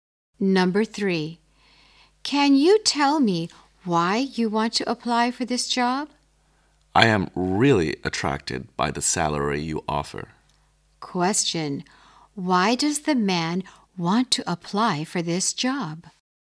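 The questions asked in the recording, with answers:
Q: Why does the man want to apply for this job?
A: He is attracted by the salary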